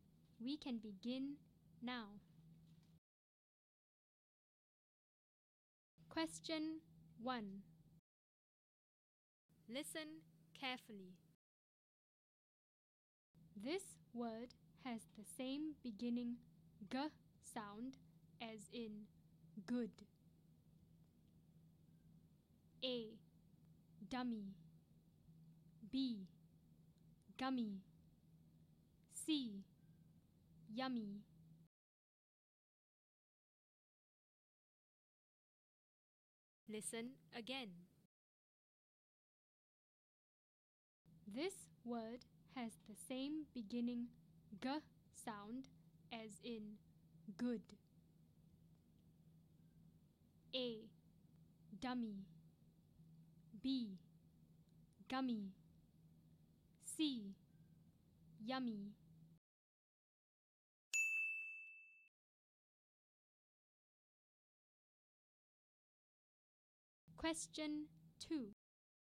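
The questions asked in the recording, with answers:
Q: This word has the same beginning G sound as in good.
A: B: Gummy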